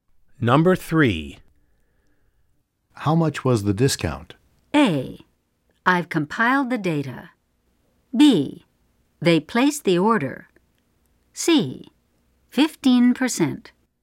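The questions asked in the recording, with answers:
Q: How much was the discount?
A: C: 15%.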